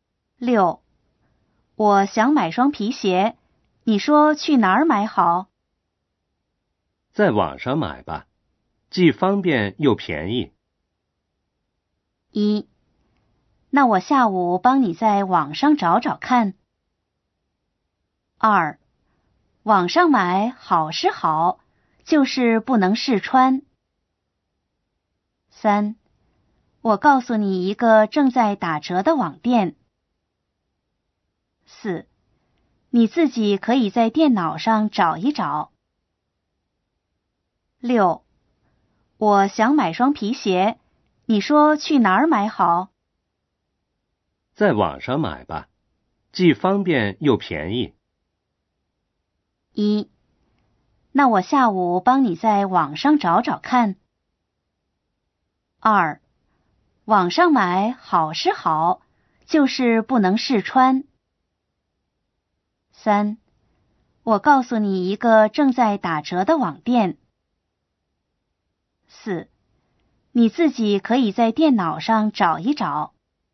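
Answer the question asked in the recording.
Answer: 二: 网上买好是好,就是不能试穿。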